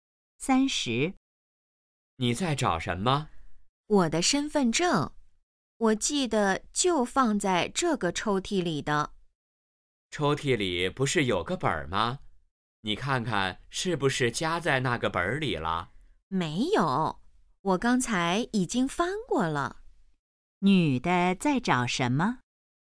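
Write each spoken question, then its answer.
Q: 女的在找什么?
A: 身份证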